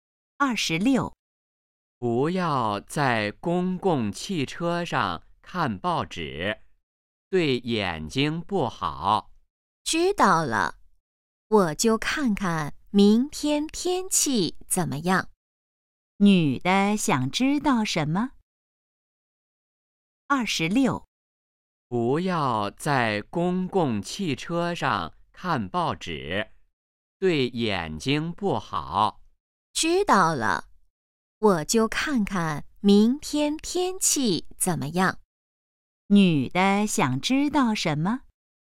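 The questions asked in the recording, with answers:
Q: 女的想知道什么?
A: 明天天气怎么样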